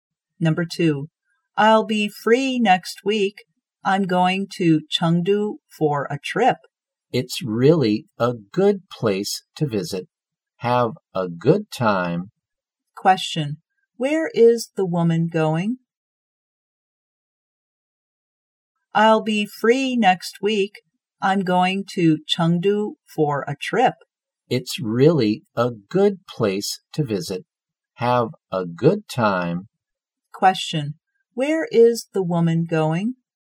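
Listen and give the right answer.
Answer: Chengdu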